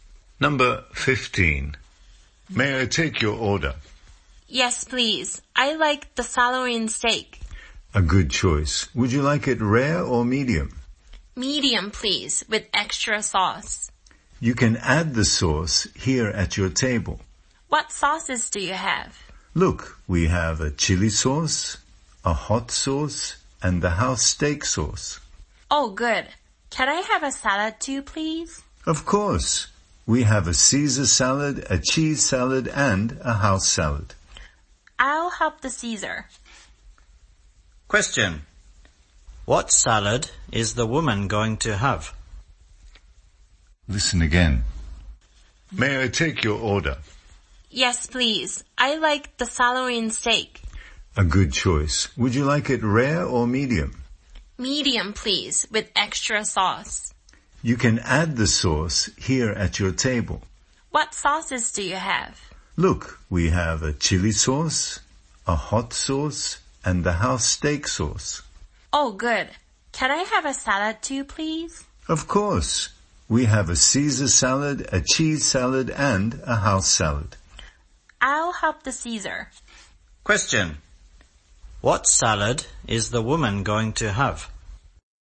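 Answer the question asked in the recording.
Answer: Caesar salad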